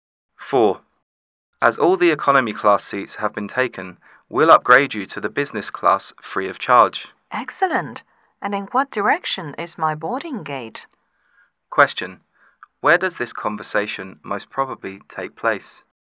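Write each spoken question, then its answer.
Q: Where does this conversation most probably take place?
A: At an airport check-in counter.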